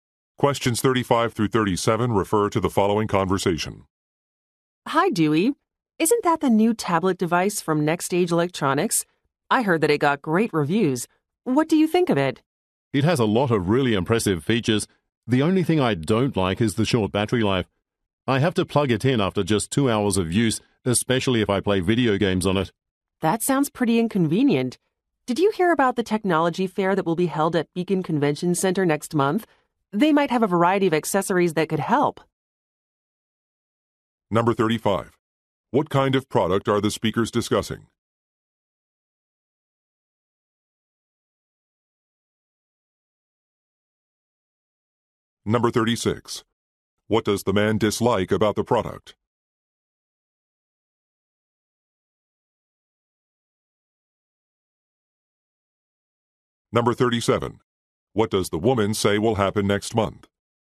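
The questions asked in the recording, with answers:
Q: What kind of product are the speakers discussing?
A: A tablet device

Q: What does the man dislike about the product?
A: Its short battery life

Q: What does the woman say will happen next month?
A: A technology fair will be held at Beacon Convention Center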